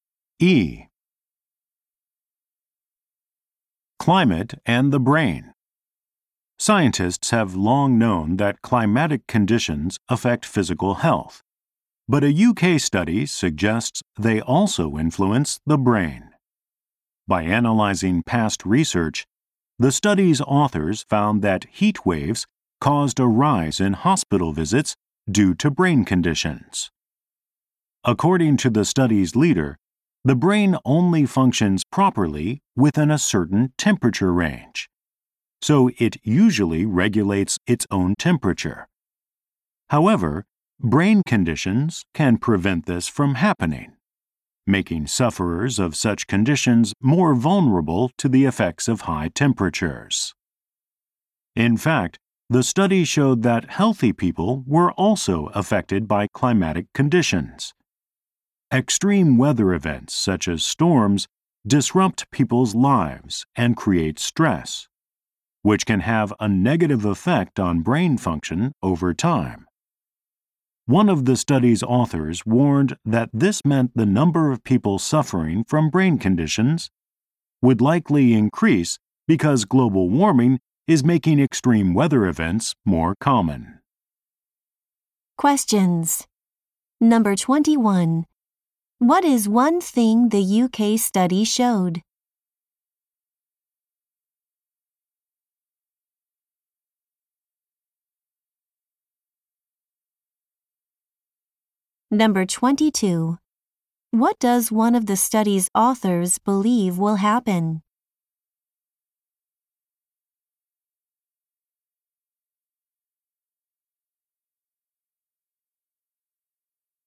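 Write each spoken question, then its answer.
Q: What does one of the study's authors believe will happen?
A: More people will suffer from brain conditions as global warming makes extreme weather more common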